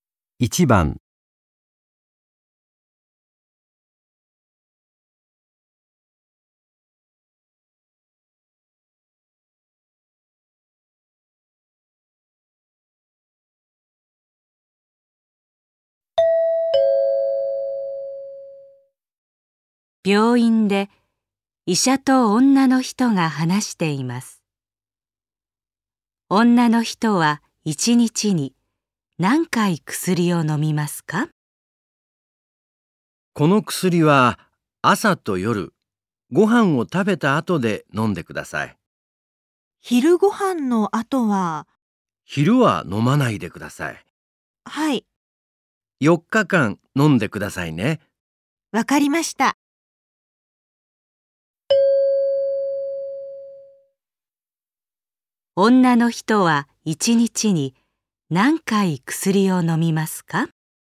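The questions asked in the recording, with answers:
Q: 女の人は1日に何回薬を飲みますか?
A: 2回(朝と夜)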